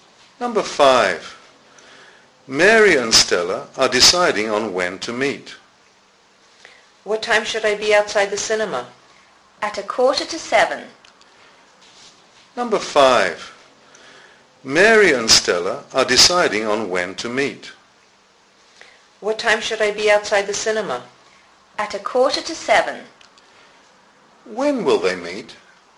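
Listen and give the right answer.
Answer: At 6:45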